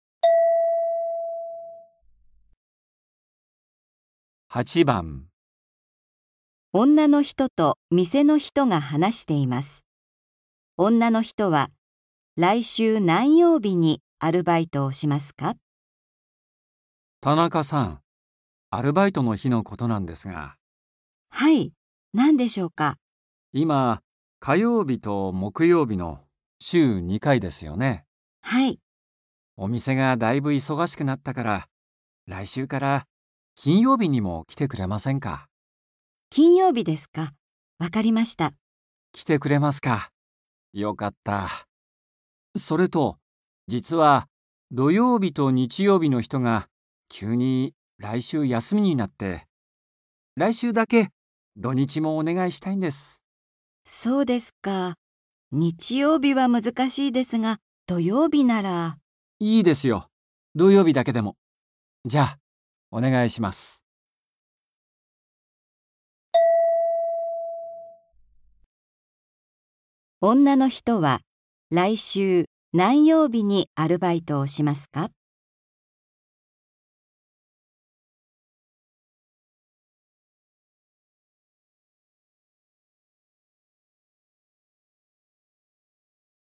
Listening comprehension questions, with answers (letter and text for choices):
女の人は、来週 何曜日に アルバイトを しますか。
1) 火曜日と 木曜日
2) 火曜日と 木曜日と 金曜日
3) 火曜日と 木曜日と 金曜日と 土曜日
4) 火曜日と 木曜日と 金曜日と 土曜日と 日曜日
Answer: 3) 火曜日と 木曜日と 金曜日と 土曜日

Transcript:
F:金曜日ですか。わかりました。
M:来て くれますか。よかった。それと、実は、土曜日と 日曜日の 人が 急に 来週 休みになって、来週だけ 土日も お願いしたいんです。
M:いいですよ、土曜日だけでも。じゃあ、お願いします。

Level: N4.44